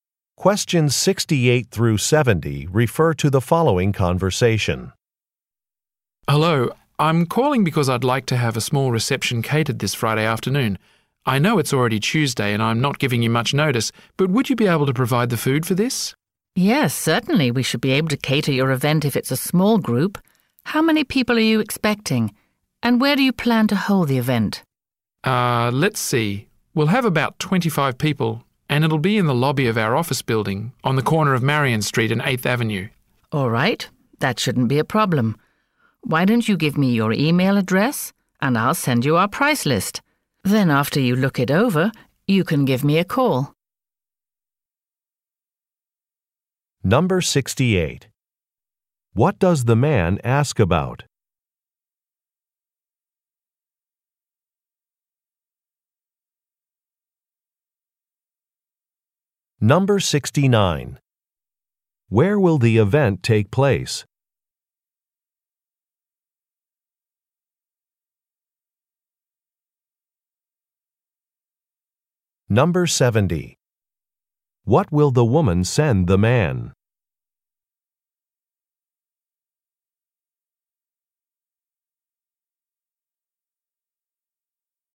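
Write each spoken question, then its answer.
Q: What does the man ask about?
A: Having a reception catered

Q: Where will the event take place?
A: In the lobby of his office building

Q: What will the woman send the man?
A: A price list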